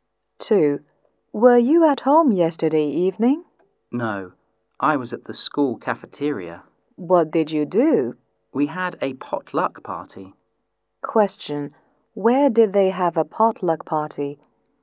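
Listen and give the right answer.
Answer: At the school cafeteria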